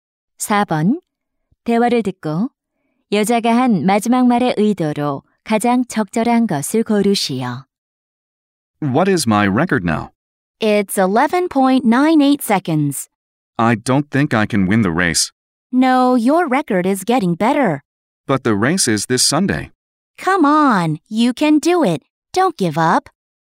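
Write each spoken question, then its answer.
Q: 대화를 듣고 여자가 한 마지막 말의 의도로 가장 적절한 것을 고르시오.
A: 격려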